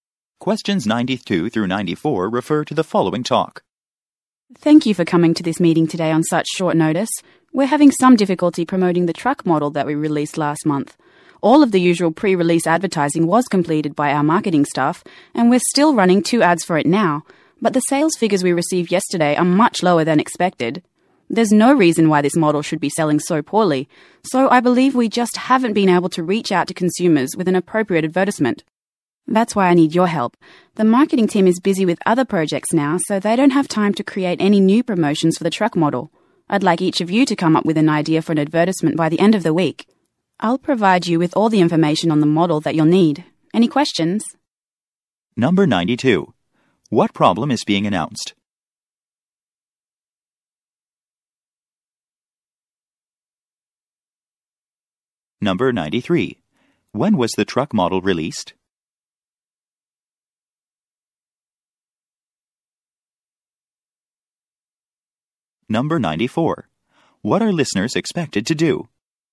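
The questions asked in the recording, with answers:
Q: What problem is being announced?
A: A new truck model is selling poorly

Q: When was the truck model released?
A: Last month

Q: What are listeners expected to do?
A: Come up with an advertisement idea by the end of the week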